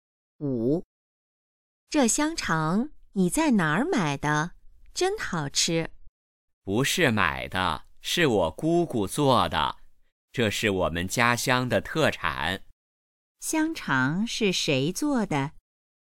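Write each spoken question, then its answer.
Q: 香肠是谁做的?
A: 姑姑做的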